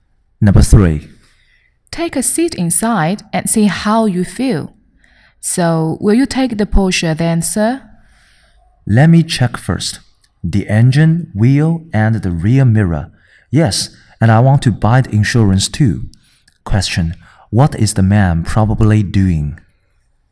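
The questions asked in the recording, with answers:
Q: What is the man probably doing?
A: Buying a car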